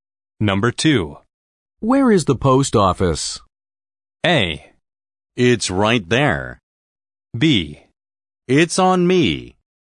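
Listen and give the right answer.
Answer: A: It's right there.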